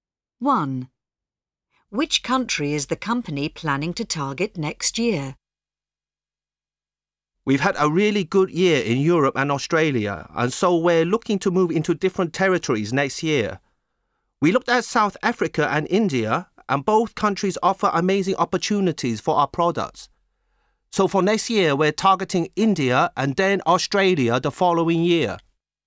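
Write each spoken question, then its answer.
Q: Which country is the company planning to target next year?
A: India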